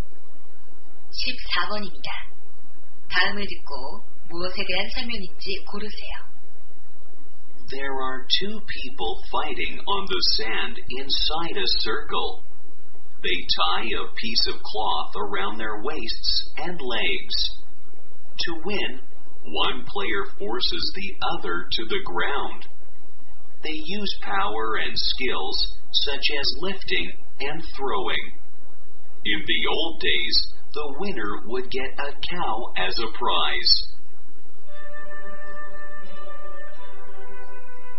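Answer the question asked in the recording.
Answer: 씨름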